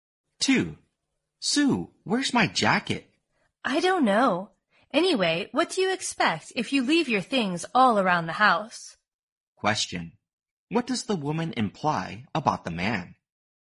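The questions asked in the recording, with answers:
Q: What does the woman imply about the man?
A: He is careless and leaves his things all around the house.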